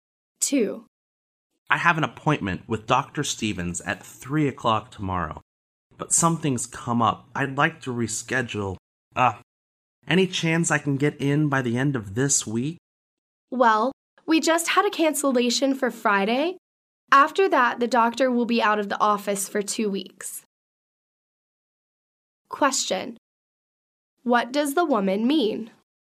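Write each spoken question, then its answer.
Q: What does the woman mean?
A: He can see the doctor on Friday, or else wait two weeks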